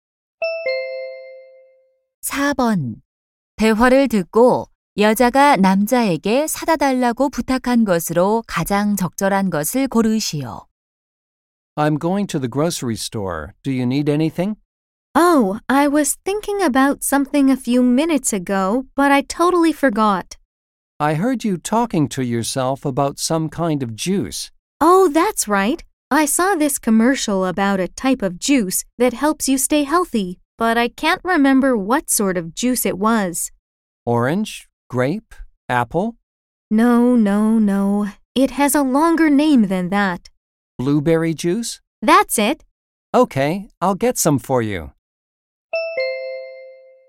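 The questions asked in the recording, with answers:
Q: 대화를 듣고 여자가 남자에게 사다 달라고 부탁한 것으로 가장 적절한 것을 고르시오.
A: 블루베리 주스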